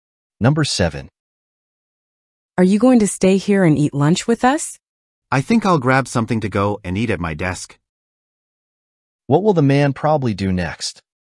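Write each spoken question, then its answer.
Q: What will the man probably do next?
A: Get food to go and eat at his desk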